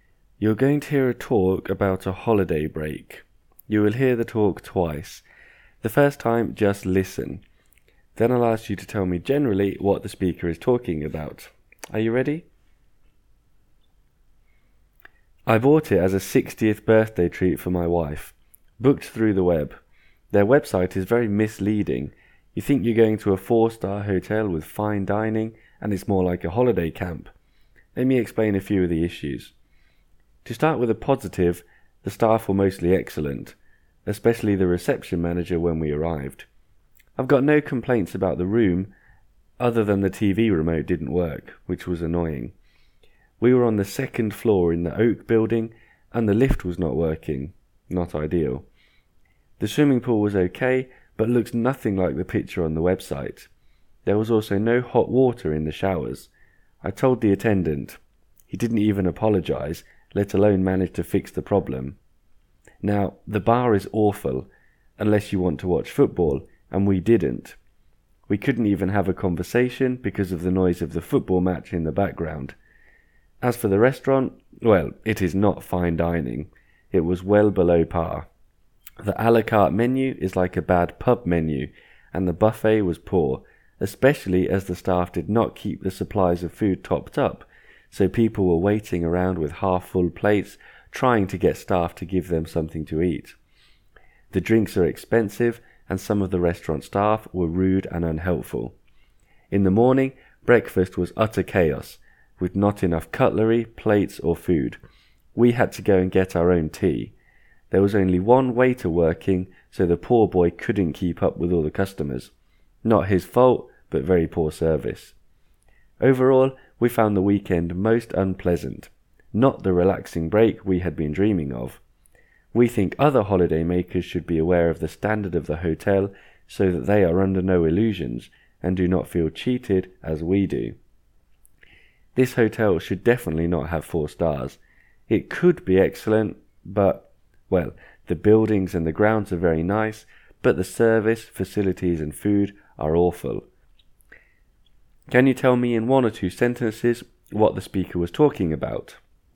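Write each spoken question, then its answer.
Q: Can you tell me in 1 or 2 sentences what the speaker was talking about?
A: A man complaining about a disappointing weekend break at a supposedly 4-star hotel he booked for his wife's 60th birthday.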